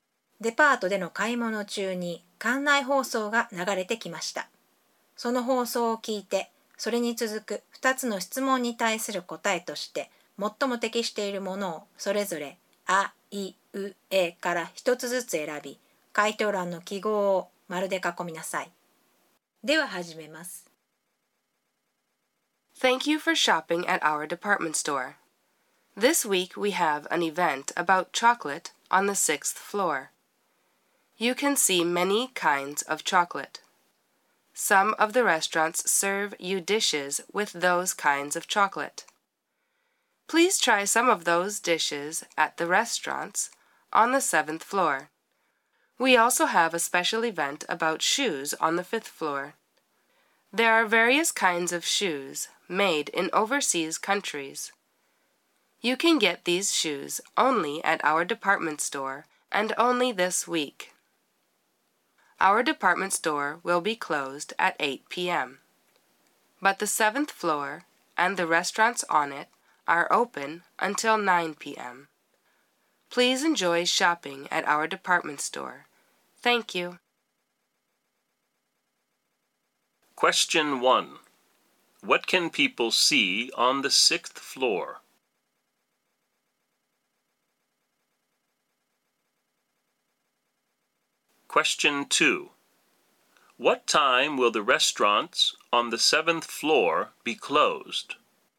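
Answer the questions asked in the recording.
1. Many kinds of chocolate
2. At 9 p.m.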